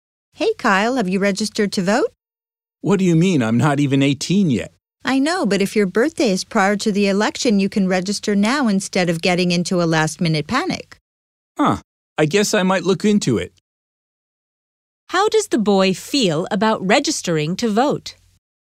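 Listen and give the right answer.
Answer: He might look into it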